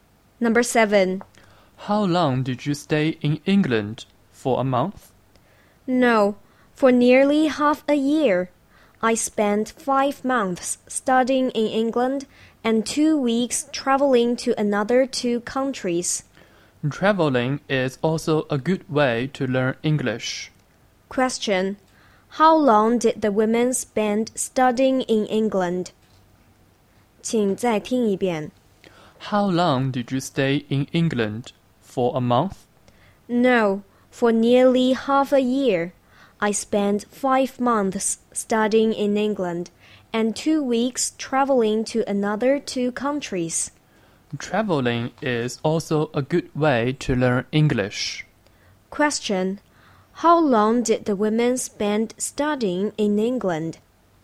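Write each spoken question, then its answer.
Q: How long did the women spend studying in England?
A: 5 months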